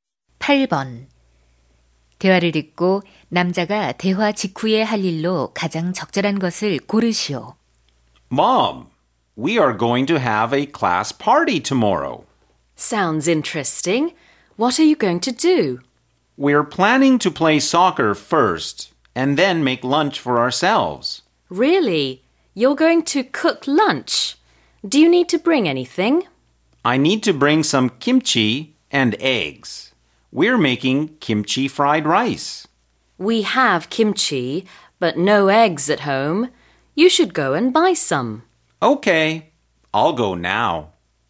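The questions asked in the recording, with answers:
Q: 대화를 듣고 남자가 대화 직후에 할 일로 가장 적절한 것을 고르시오.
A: 달걀 사러 가기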